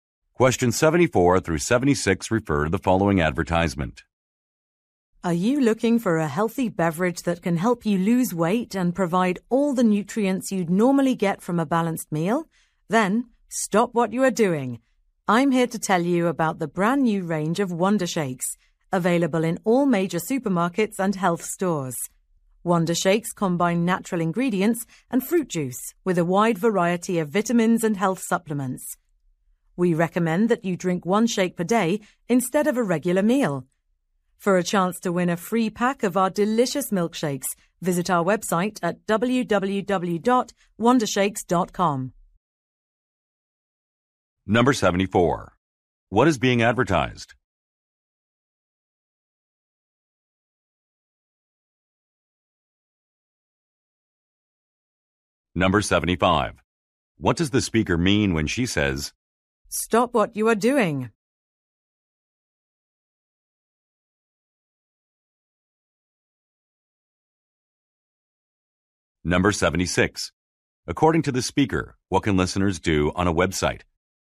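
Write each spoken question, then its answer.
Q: What is being advertised?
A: A health drink (Wonder Shakes)

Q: According to the speaker, what can listeners do on a website?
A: Enter to win a free pack of milkshakes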